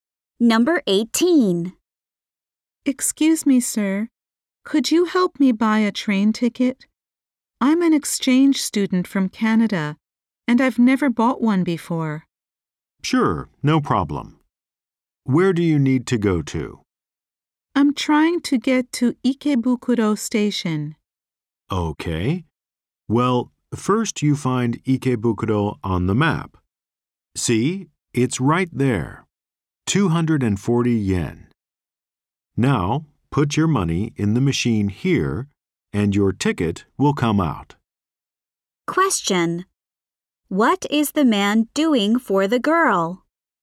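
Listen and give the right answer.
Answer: Helping her buy a train ticket.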